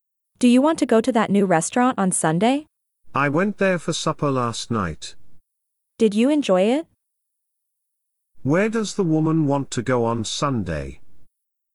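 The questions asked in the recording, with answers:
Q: Where does the woman want to go on Sunday?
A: To the new restaurant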